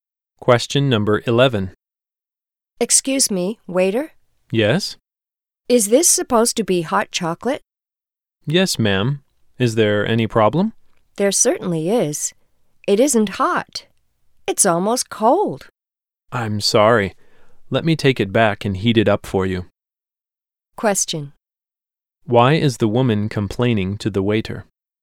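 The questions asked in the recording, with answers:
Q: Why is the woman complaining to the waiter?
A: Her hot chocolate isn't hot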